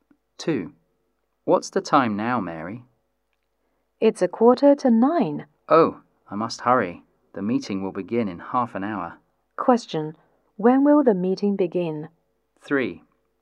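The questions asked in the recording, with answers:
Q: When will the meeting begin?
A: At 9:15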